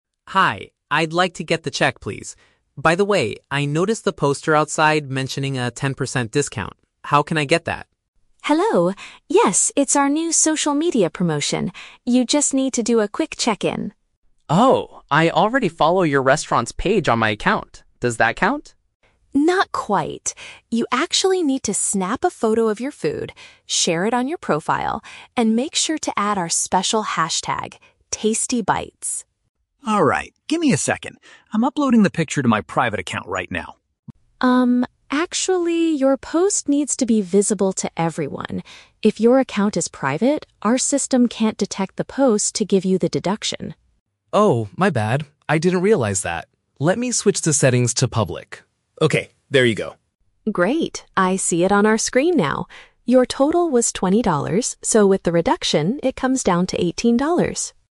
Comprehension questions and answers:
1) What does the customer mistakenly think is enough to get the cheaper price?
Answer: Being a subscriber to the restaurant's online profile.

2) What must the customer include in his online post?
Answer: A specific keyword with a symbol.

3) Why does the cashier ask the customer to change his post settings?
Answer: Because the staff cannot verify the post if it is hidden.

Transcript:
Customer: Hi, I'd like to get the check, please. By the way, I noticed the poster outside mentioning a 10% discount. How can I get that?
Cashier: Hello! Yes, it's our new social media promotion. You just need to do a quick check-in.
Customer: Oh, I already follow your restaurant's page on my account. Does that count?
Cashier: Not quite. You actually need to snap a photo of your food, share it on your profile, and make sure to add our special hashtag, #TastyBites.
Customer: Alright, give me a second. I'm uploading the picture to my private account right now.
Cashier: Um, actually, your post needs to be visible to everyone. If your account is private, our system can't detect the post to give you the deduction.
Customer: Oh, my bad. I didn't realize that. Let me switch the settings to public... Okay, there you go!
Cashier: Great, I see it on our screen now.